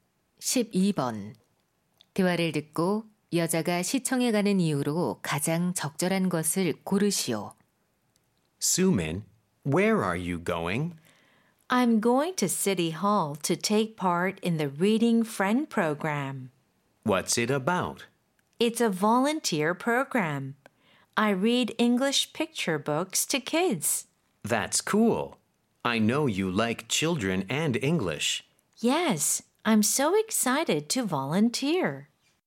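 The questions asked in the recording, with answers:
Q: 대화를 듣고 여자가 시청에 가는 이유로 가장 적절한 것을 고르시오.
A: 아이들에게 영어 그림책을 읽어주는 봉사활동을 하려고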